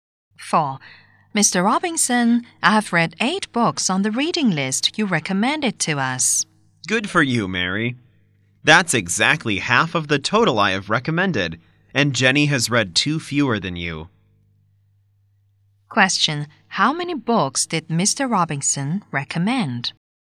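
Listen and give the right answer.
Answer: 16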